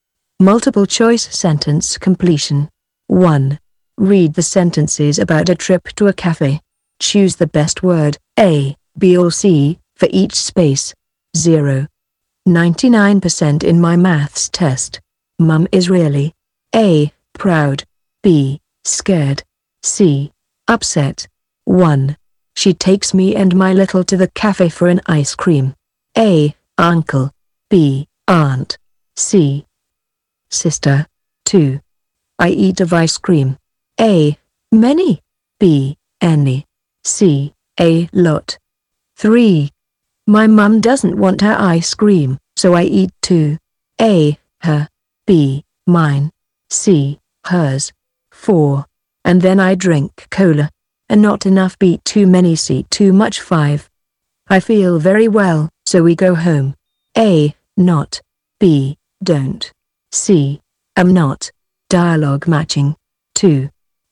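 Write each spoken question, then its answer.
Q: She takes me and my little to the cafe for an ice cream.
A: C: sister

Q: I eat of ice cream.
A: C: a lot

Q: My mum doesn't want her ice cream, so I eat two.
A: C: hers

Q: And then I drink cola.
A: C: too much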